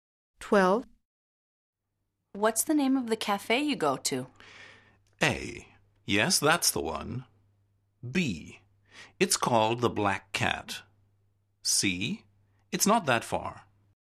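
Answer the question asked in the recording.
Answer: B: It's called the Black Cat.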